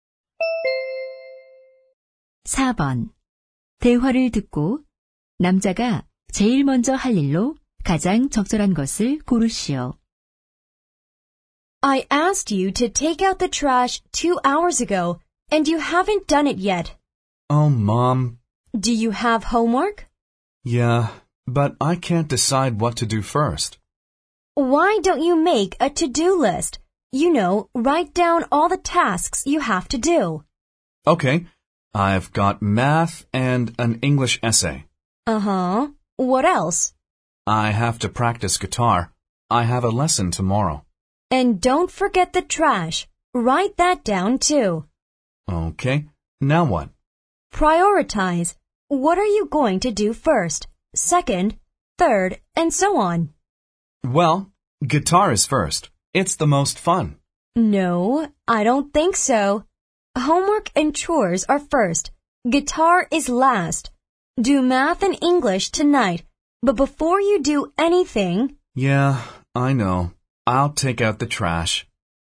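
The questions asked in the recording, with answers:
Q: 대화를 듣고 남자가 제일 먼저 할 일로 가장 적절한 것을 고르시오.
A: 쓰레기 내다 버리기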